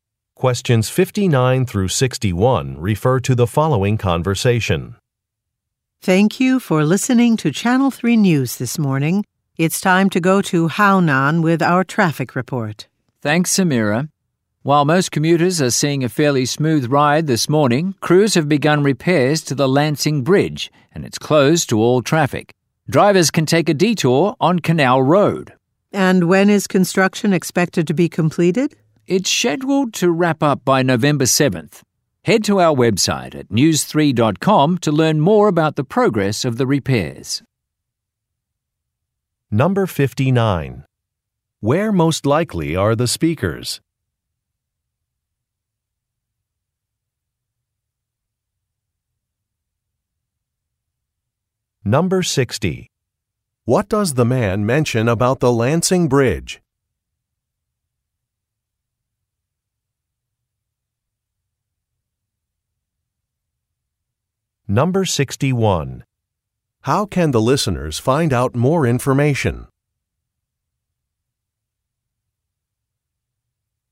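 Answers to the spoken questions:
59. At a radio station (Channel 3 News)
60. It is closed for repairs
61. By visiting the website news3.com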